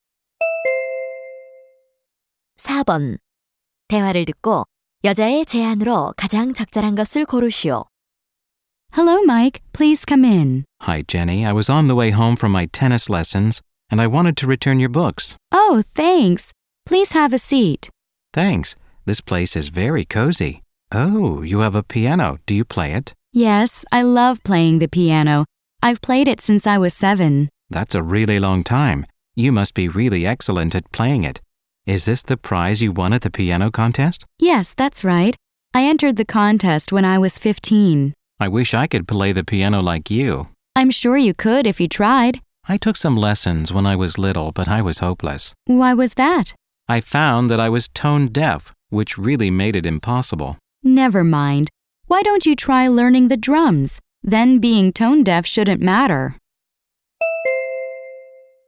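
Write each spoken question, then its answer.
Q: 대화를 듣고 여자의 제안으로 가장 적절한 것을 고르시오.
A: 드럼을 배워 보라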